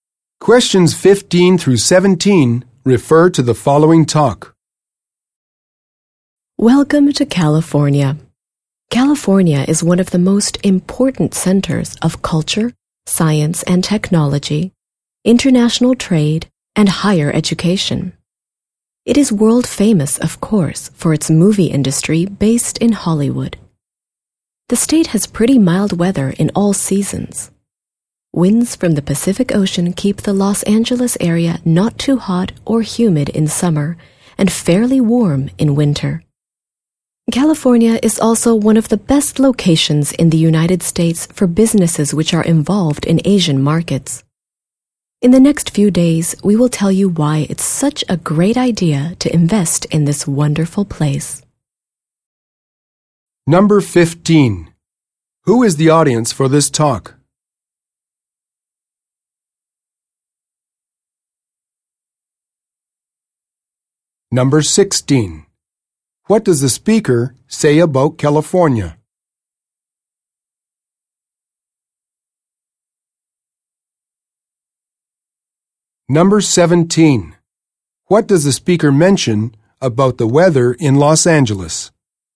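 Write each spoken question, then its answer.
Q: Who is the audience for this talk?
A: Potential investors / business people

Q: What does the speaker mention about the weather in Los Angeles?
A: It is not too hot or humid in summer and fairly warm in winter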